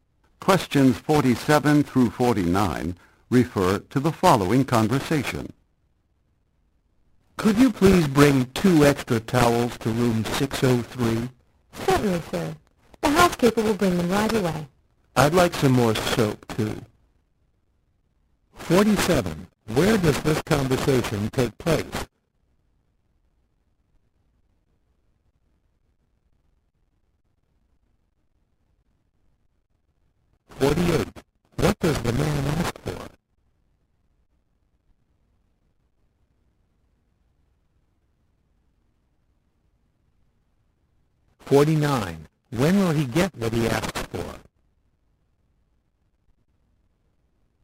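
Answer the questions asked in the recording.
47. In a hotel
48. Extra towels and soap
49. Right away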